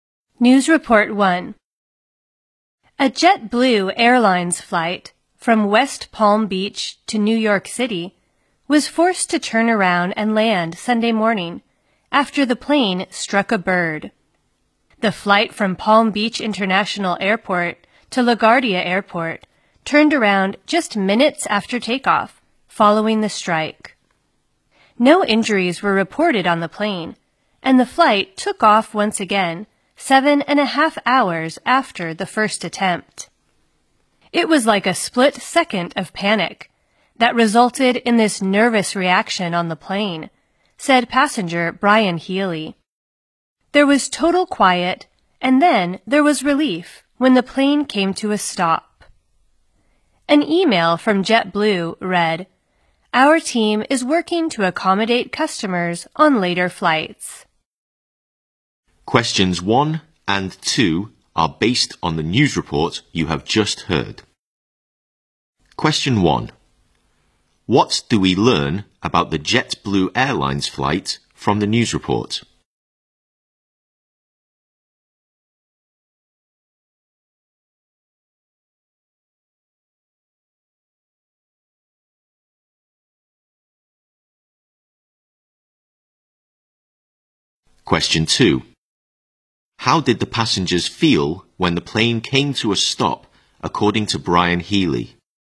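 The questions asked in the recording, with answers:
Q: What do we learn about the JetBlue Airlines flight from the news report?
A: It turned around and landed after striking a bird

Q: How did the passengers feel when the plane came to a stop, according to Brian Healy?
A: Relieved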